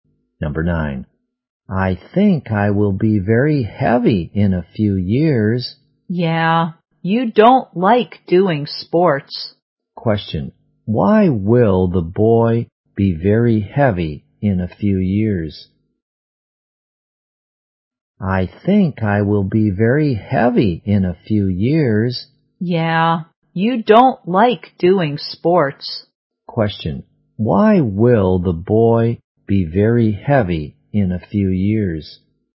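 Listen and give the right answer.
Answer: He doesn't like doing sports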